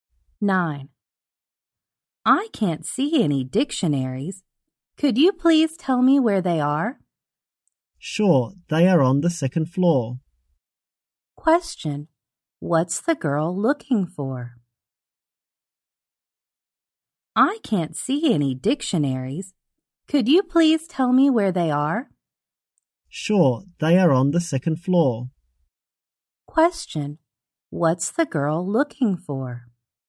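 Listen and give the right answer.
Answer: Dictionaries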